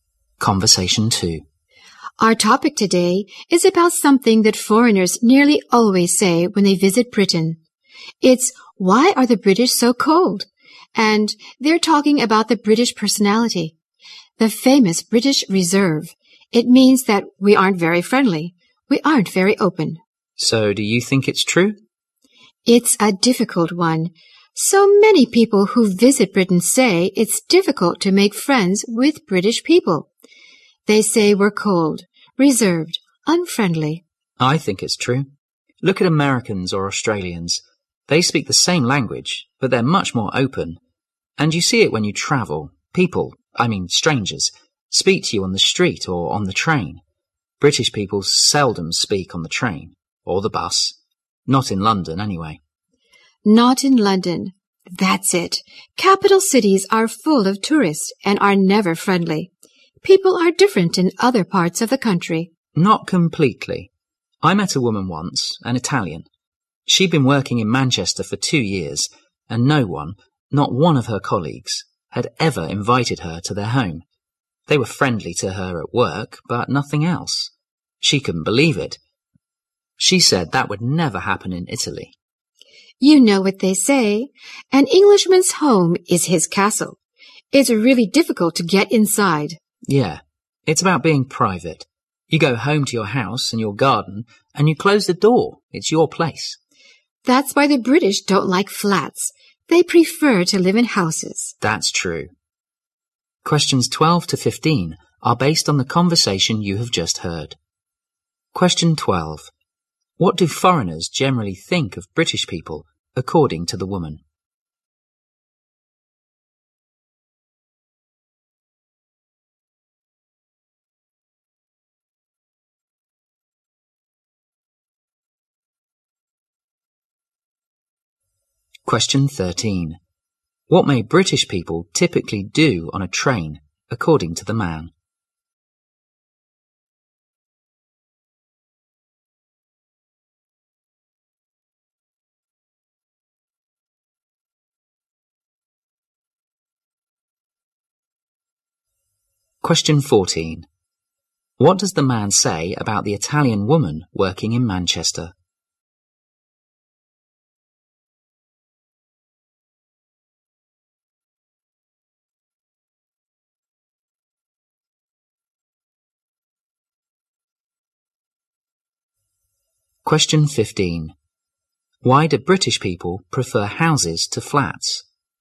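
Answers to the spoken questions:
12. They are cold, reserved and unfriendly
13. Seldom speak to others
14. None of her colleagues invited her to their home in 2 years
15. They value privacy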